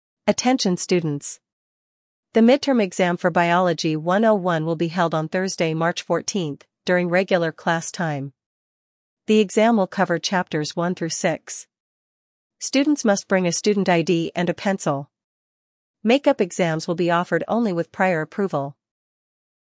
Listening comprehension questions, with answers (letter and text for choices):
Listen to an announcement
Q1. What is the main purpose of the announcement?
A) To promote library services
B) To explain study room reservation rules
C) To introduce new library hours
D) To announce library events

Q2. How long can a study room be reserved?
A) One hour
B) Two hours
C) Three hours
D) All day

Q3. What might happen if students break the rules?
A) They must clean the room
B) They will be fined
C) They may lose reservation privileges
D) They will be reported to professors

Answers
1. B) To explain study room reservation rules
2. B) Two hours
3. C) They may lose reservation privileges

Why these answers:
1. The announcement explains rules for using study rooms.
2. The announcement clearly states two hours.
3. "Loss of privileges" suggests restricted future access.